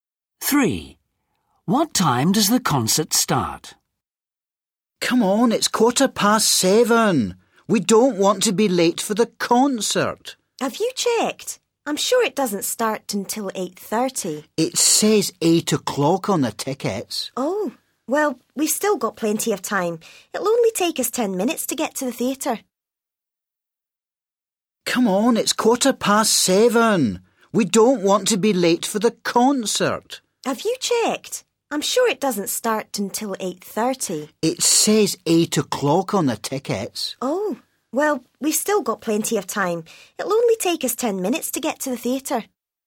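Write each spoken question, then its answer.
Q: What time does the concert start?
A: 8 o'clock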